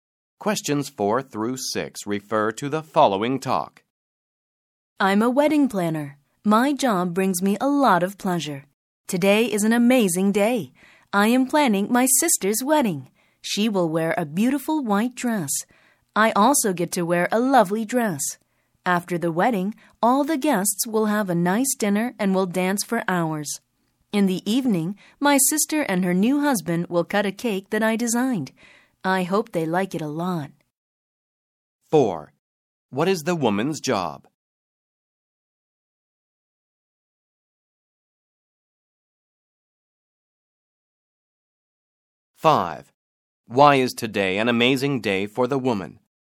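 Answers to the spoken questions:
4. A wedding planner
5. She is planning her sister's wedding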